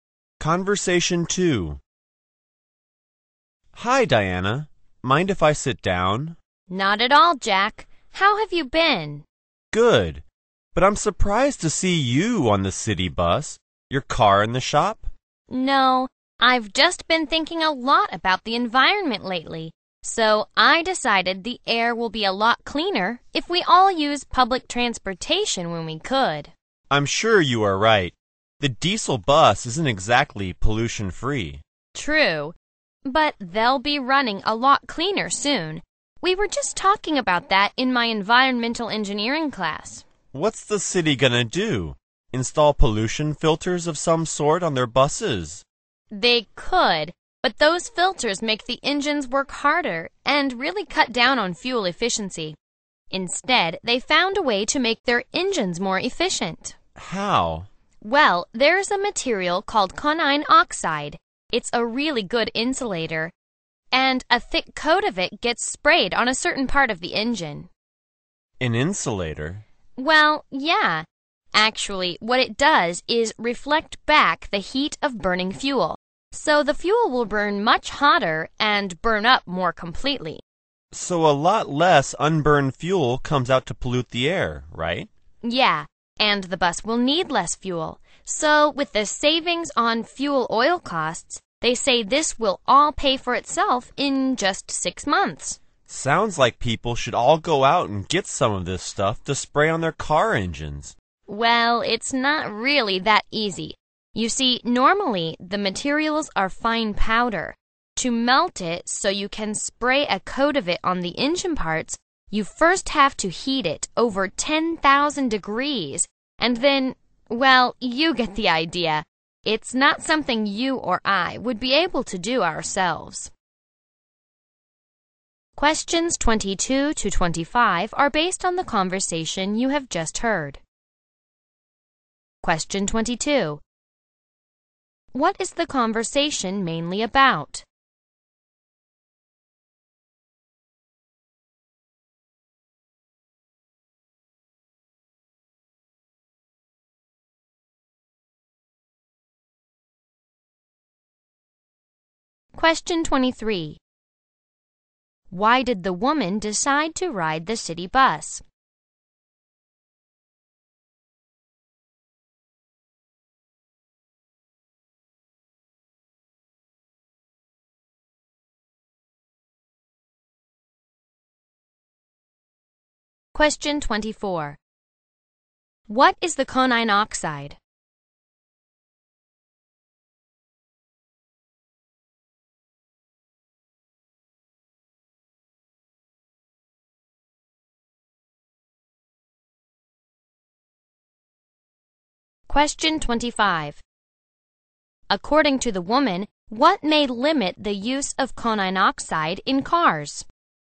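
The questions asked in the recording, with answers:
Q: What is the conversation mainly about?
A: A way to make bus engines cleaner and more efficient

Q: Why did the woman decide to ride the city bus?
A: She is concerned about the environment and cleaner air

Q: What is the conine oxide?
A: A very good insulating material

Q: According to the woman, what may limit the use of conine oxide in cars?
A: It must be heated above 10,000 degrees before it can be sprayed on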